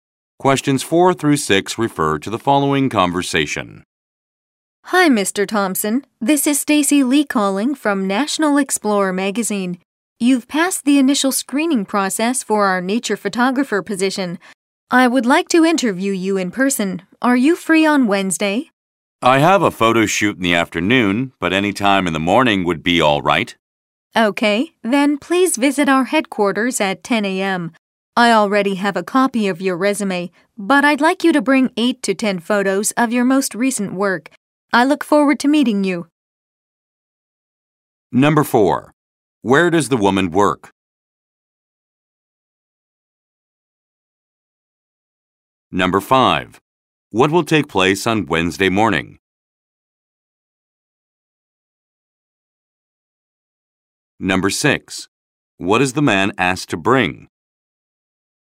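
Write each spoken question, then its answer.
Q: Where does the woman work?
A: At a magazine (National Explorer)

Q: What will take place on Wednesday morning?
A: A job interview

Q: What is the man asked to bring?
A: 8 to 10 photos of his most recent work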